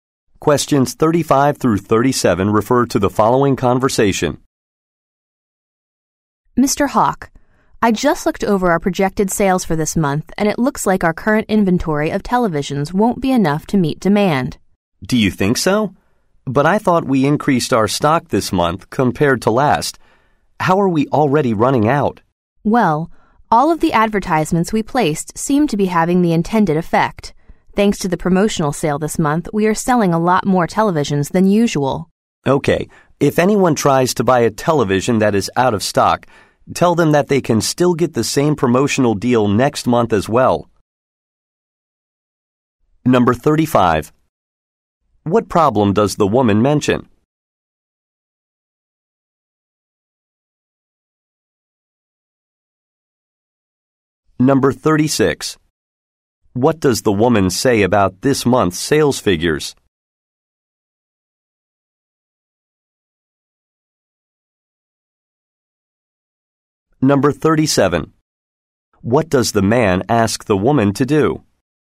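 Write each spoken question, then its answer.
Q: What problem does the woman mention?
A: The television inventory won't meet demand

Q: What does the woman say about this month's sales figures?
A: Sales are higher than usual because of the promotional sale and ads

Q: What does the man ask the woman to do?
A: Tell customers they can get the same promotional deal next month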